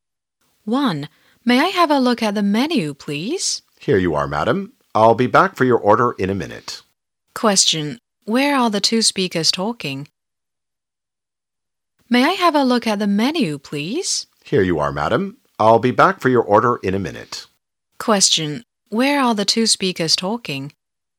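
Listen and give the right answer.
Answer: In a restaurant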